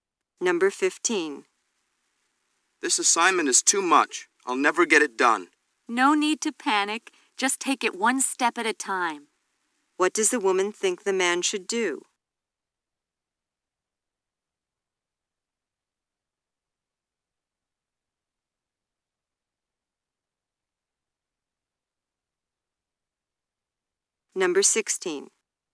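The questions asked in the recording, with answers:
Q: What does the woman think the man should do?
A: Do the assignment one step at a time.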